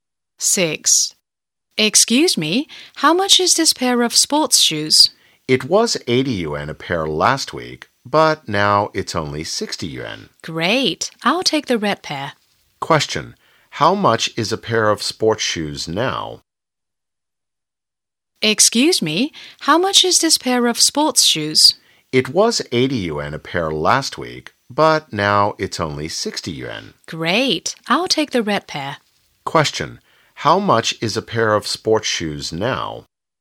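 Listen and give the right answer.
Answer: 60 yuan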